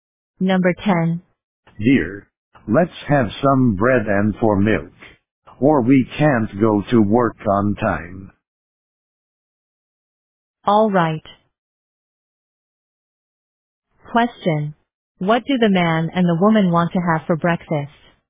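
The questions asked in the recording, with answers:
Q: What do the man and the woman want to have for breakfast?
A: Bread and milk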